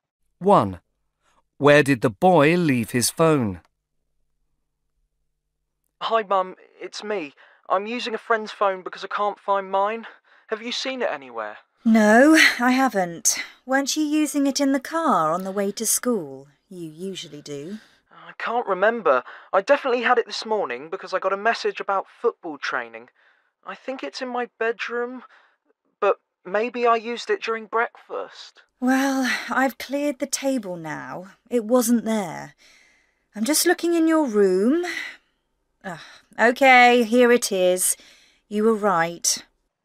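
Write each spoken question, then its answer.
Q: Where did the boy leave his phone?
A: In his bedroom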